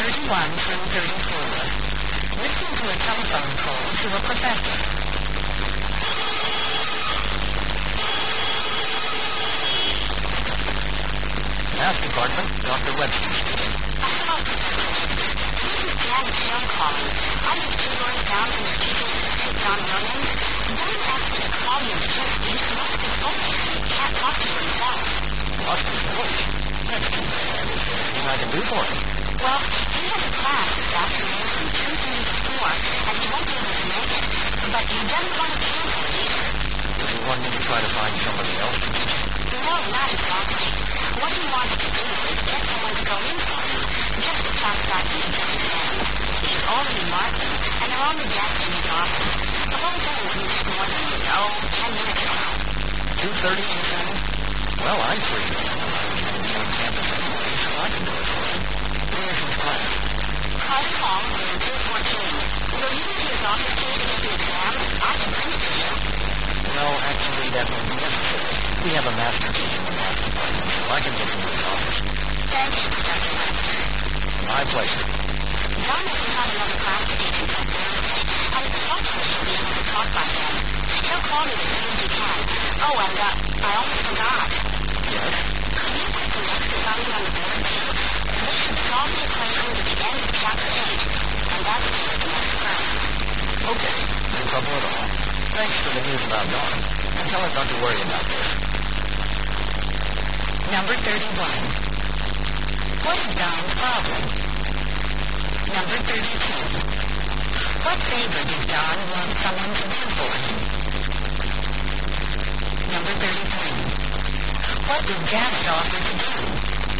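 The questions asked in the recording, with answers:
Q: What's Don's problem?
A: He has lost his voice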